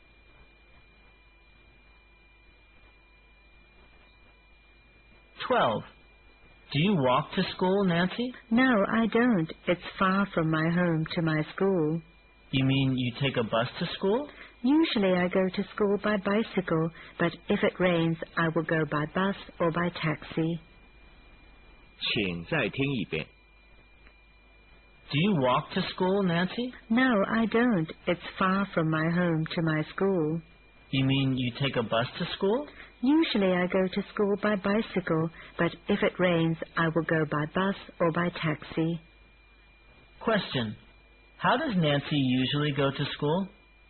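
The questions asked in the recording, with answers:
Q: How does Nancy usually go to school?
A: By bicycle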